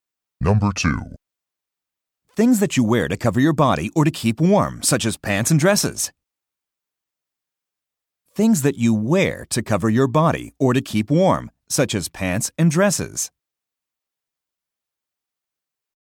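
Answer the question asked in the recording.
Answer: clothes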